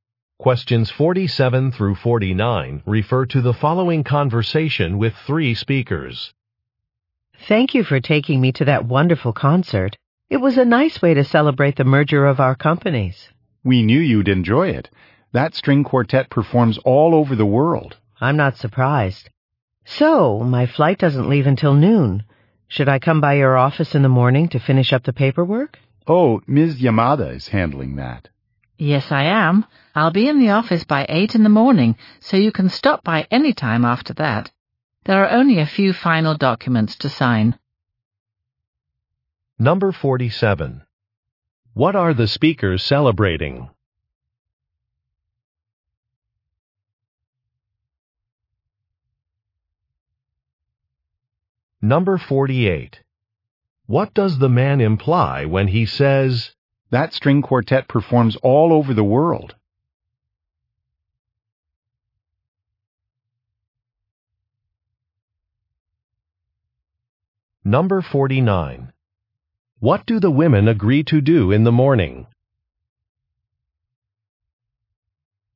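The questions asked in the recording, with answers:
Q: What are the speakers celebrating?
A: A merger of their companies

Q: What do the women agree to do in the morning?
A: Finish the paperwork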